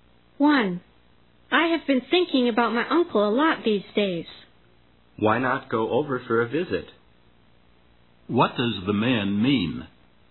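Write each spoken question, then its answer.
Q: What does the man mean?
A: The woman should go and visit her uncle.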